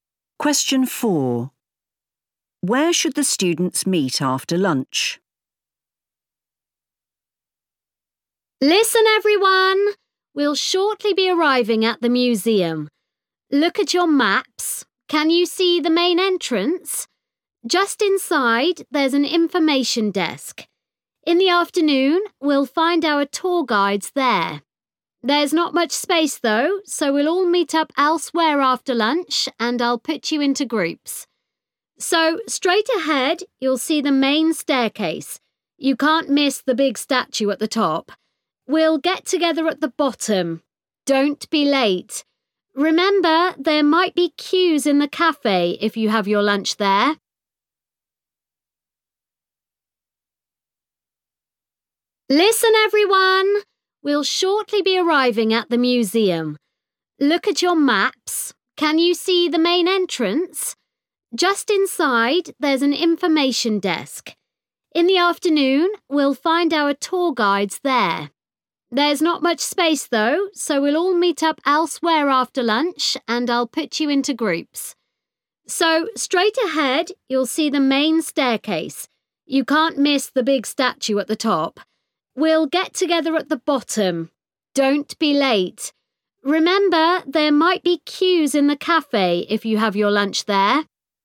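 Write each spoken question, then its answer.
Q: Where should the students meet after lunch?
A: At the bottom of the main staircase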